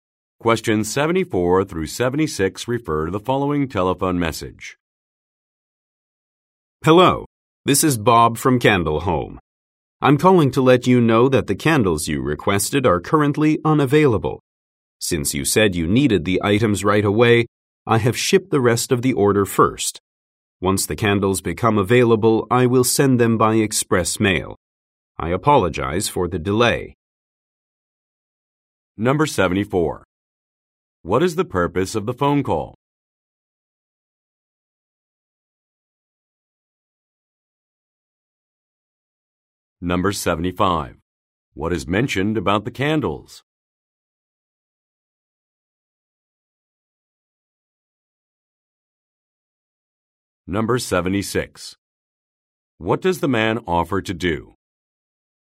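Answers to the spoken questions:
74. To say the candles are unavailable
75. They are currently unavailable
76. Send the candles by express mail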